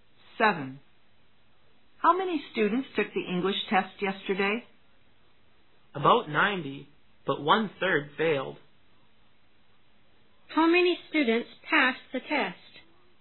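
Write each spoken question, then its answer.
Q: How many students passed the test?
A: About 60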